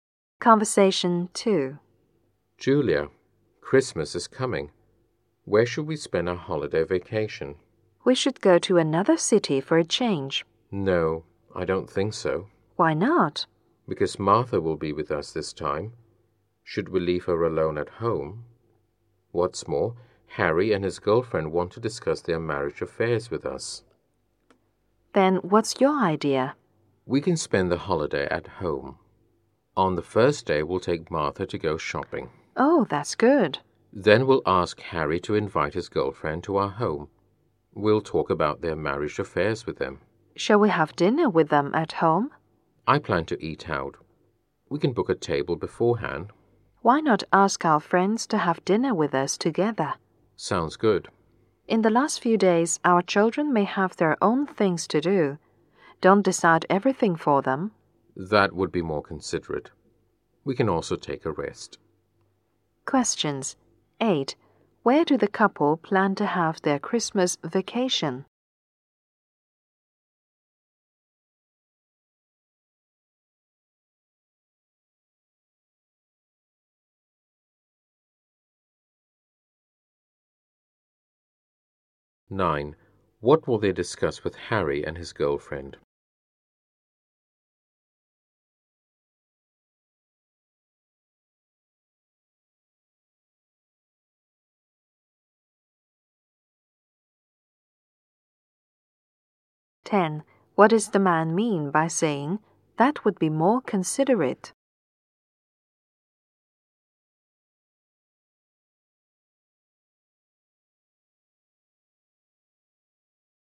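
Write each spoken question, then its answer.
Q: Where do the couple plan to have their Christmas vacation?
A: At home

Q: What will they discuss with Harry and his girlfriend?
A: Their marriage affairs

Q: What does the man mean by saying that would be more considerate?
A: They should let the children do their own things rather than decide everything for them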